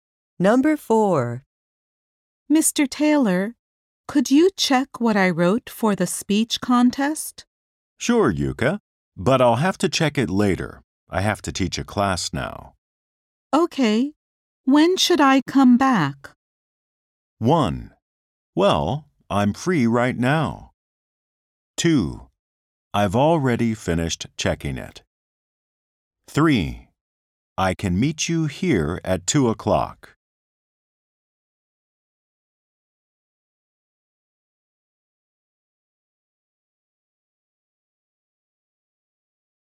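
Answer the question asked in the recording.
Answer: I can meet you here at 2 o'clock.

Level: 英検準2級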